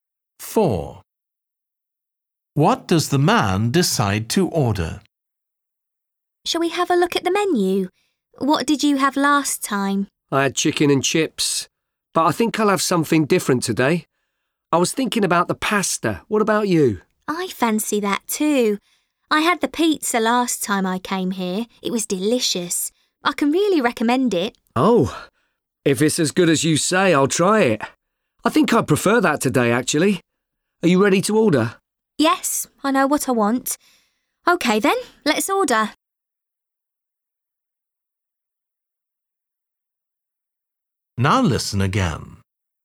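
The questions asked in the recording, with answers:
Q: What does the man decide to order?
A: Pizza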